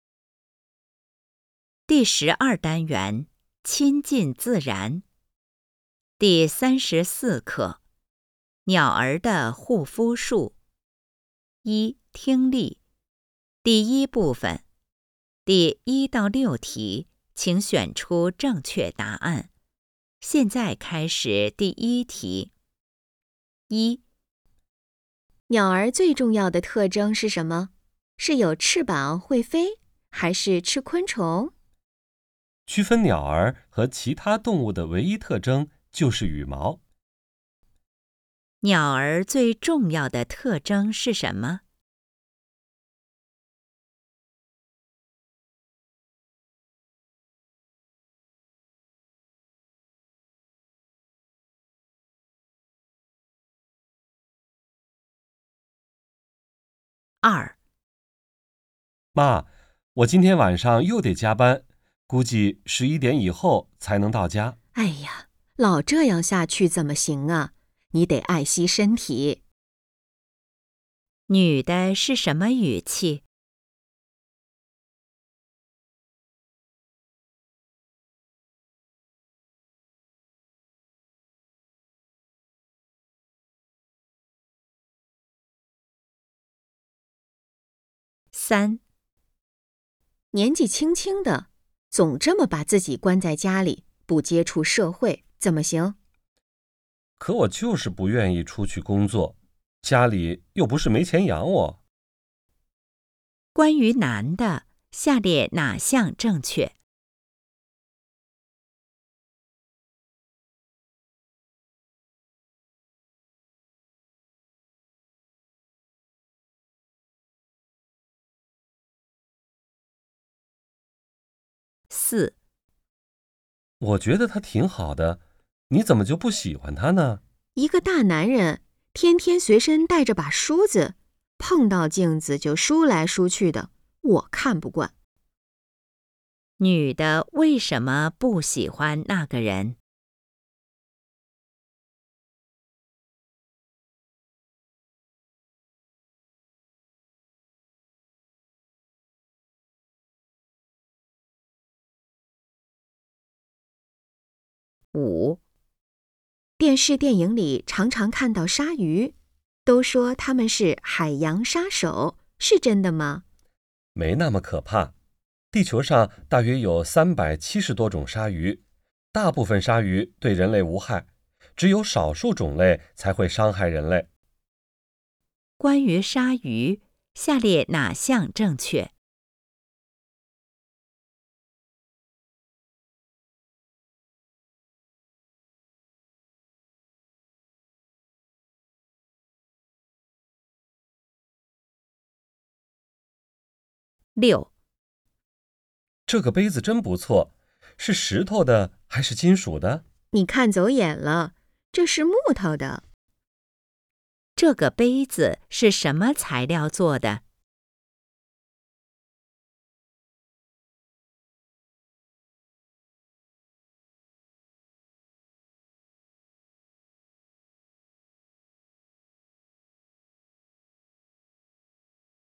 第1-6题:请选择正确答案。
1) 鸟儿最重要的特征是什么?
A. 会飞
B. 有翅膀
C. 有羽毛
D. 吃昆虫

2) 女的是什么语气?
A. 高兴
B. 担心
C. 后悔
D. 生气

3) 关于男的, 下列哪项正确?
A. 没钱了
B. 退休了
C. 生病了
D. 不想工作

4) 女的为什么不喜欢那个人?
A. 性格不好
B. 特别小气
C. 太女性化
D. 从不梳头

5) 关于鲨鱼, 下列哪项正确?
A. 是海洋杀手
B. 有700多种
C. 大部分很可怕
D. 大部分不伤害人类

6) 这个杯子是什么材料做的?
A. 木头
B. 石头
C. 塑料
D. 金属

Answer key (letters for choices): 1C, 2B, 3D, 4C, 5D, 6A

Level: HSK 5